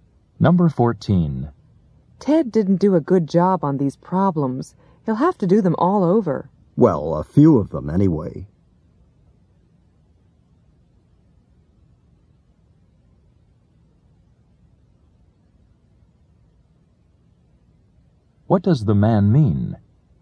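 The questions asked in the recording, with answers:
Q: What does the man mean?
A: Ted only has to redo some of the problems.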